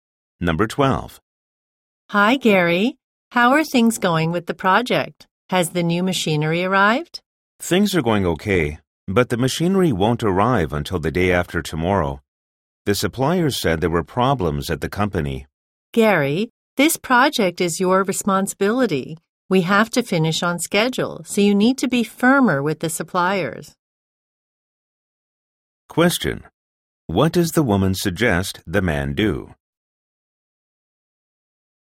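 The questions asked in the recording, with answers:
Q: What does the woman suggest the man do?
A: Be firmer with the suppliers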